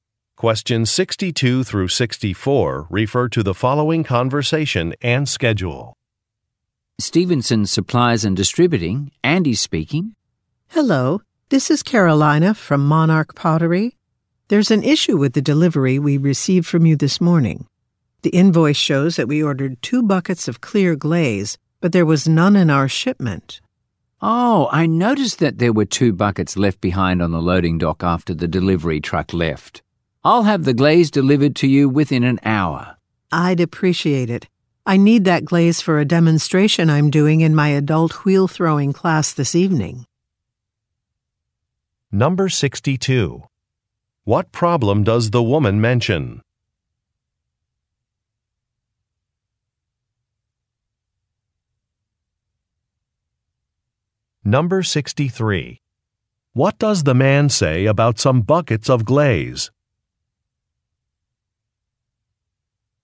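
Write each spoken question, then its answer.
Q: What problem does the woman mention?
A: Glaze was missing from the shipment

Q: What does the man say about some buckets of glaze?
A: They were left on the loading dock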